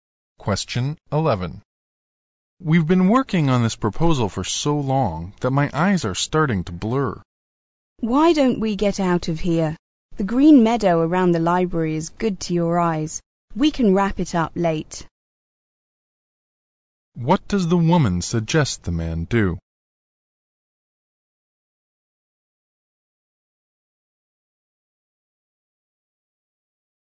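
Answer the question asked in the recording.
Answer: Take a break and go out to the meadow around the library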